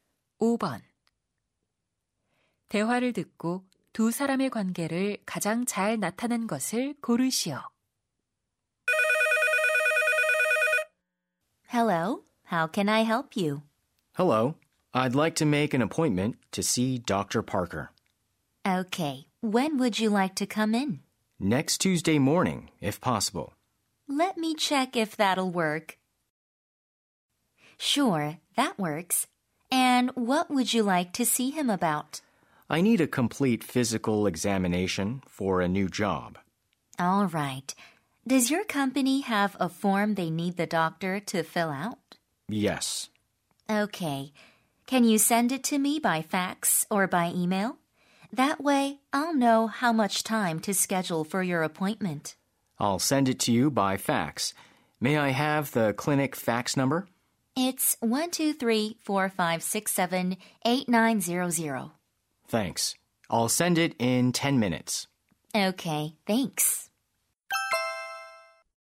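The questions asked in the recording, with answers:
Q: 대화를 듣고 두 사람의 관계를 가장 잘 나타낸 것을 고르시오.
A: 병원 접수 직원 - 환자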